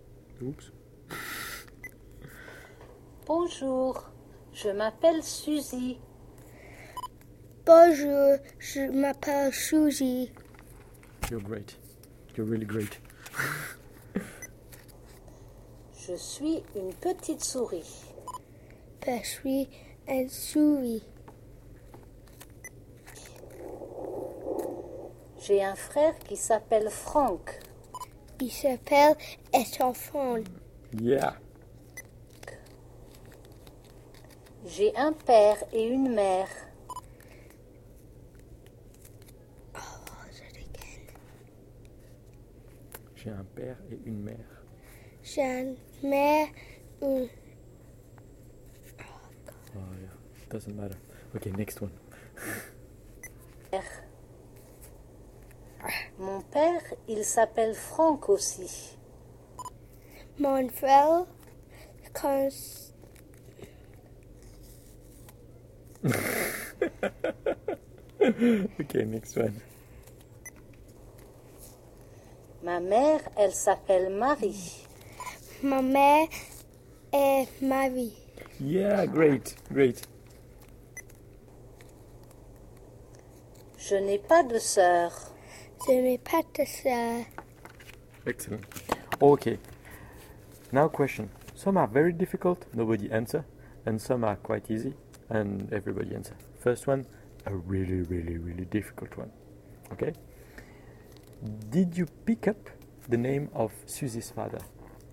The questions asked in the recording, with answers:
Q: Did you pick up the name of Susie's father?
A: It was Frank. Frank.